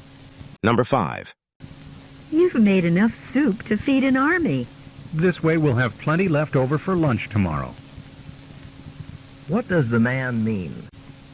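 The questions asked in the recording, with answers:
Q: What does the man mean?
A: He made extra soup on purpose so there will be leftovers for lunch tomorrow.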